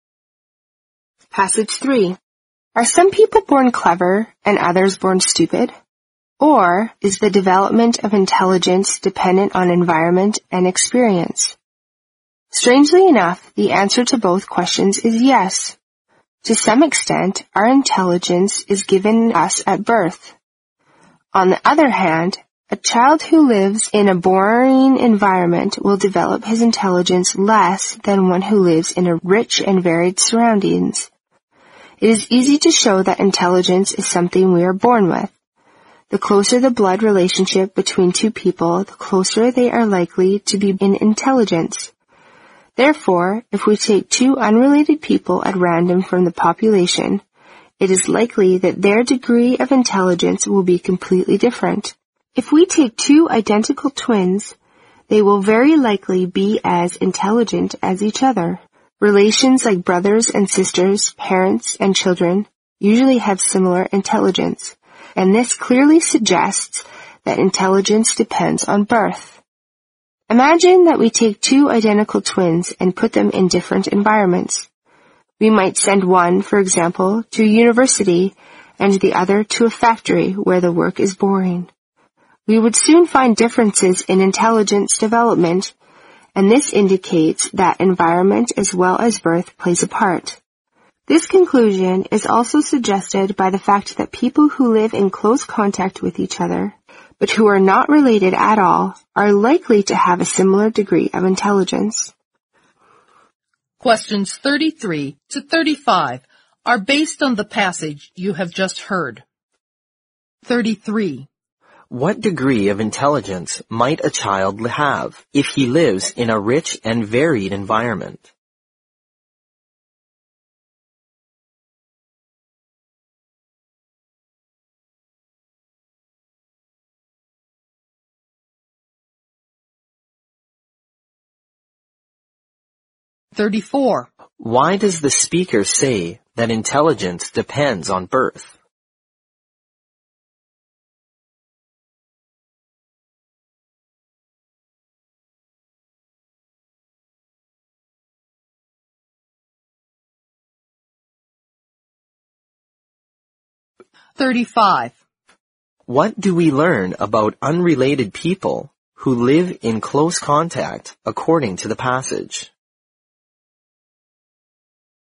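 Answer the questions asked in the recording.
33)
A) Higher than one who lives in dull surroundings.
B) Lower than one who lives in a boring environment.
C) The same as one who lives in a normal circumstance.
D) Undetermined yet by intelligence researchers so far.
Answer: A) Higher than one who lives in dull surroundings.
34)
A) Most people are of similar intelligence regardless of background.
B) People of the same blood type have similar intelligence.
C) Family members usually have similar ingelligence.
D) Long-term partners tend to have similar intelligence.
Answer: C) Family members usually have similar ingelligence.
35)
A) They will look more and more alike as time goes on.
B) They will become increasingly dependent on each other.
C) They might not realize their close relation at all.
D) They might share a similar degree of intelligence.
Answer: D) They might share a similar degree of intelligence.

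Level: 四级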